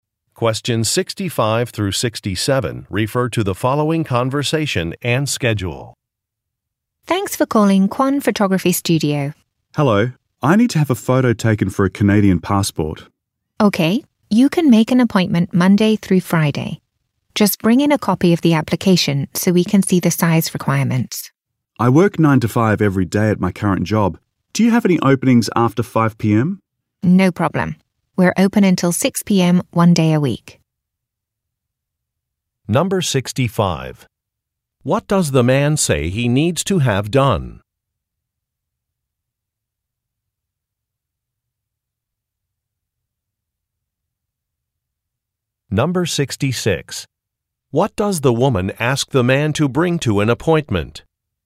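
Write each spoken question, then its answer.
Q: What does the man say he needs to have done?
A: Have a passport photo taken

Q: What does the woman ask the man to bring to an appointment?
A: A copy of the application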